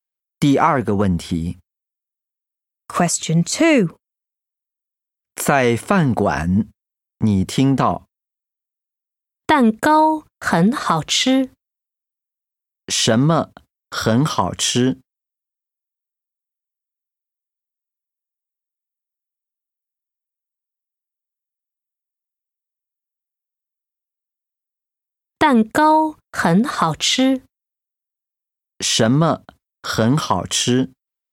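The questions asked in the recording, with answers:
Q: 什么很好吃?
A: 蛋糕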